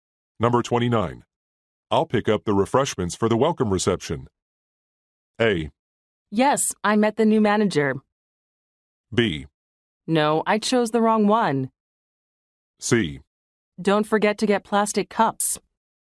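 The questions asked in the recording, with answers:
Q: I'll pick up the refreshments for the welcome reception.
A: C: Don't forget to get plastic cups.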